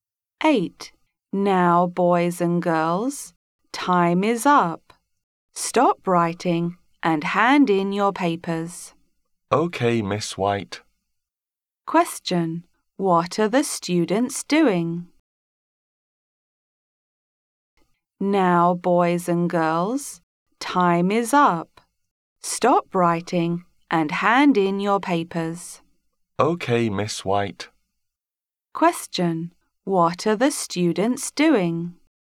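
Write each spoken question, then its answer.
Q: What are the students doing?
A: Handing in their papers after an exam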